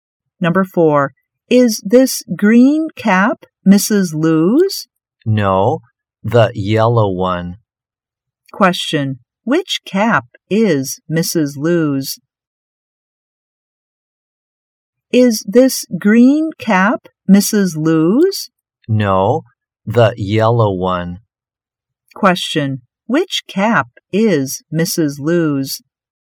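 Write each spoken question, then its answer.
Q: Which cap is Mrs. Lou's?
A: The yellow one.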